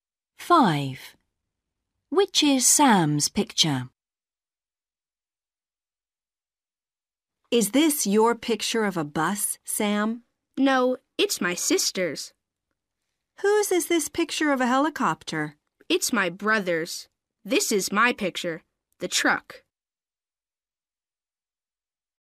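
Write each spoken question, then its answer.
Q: Which is Sam's picture?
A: the truck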